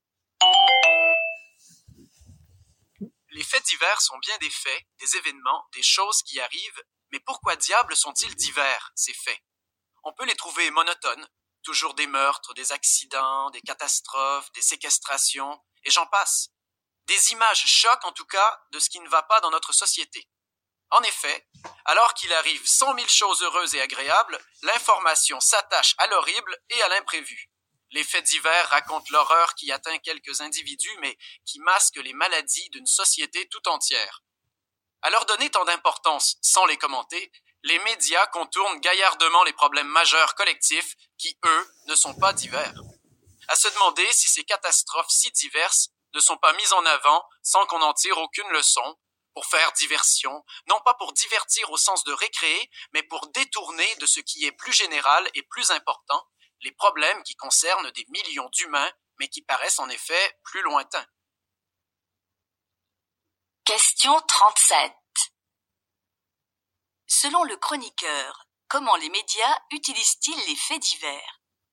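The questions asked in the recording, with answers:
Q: Selon le chroniqueur, comment les médias utilisent-ils les faits divers?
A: Pour détourner l'attention des problèmes collectifs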